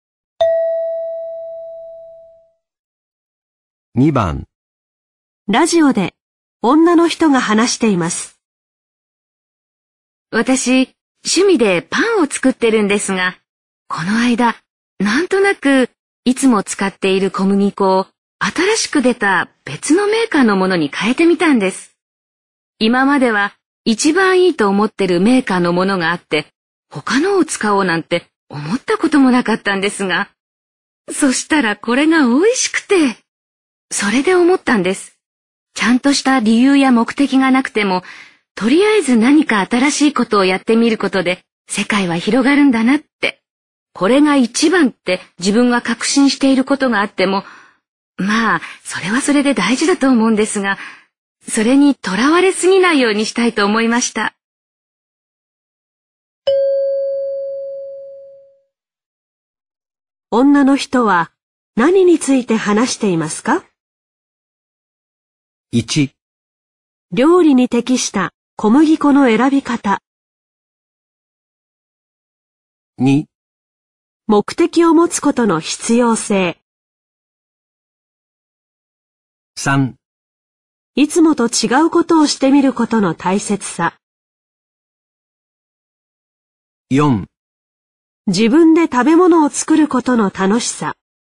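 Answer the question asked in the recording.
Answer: 3: いつもと違うことをしてみることの大切さ。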